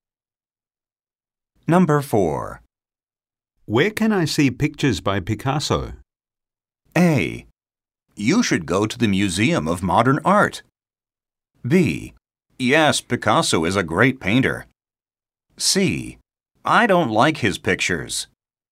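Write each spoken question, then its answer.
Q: Where can I see pictures by Picasso?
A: A: You should go to the Museum of Modern Art.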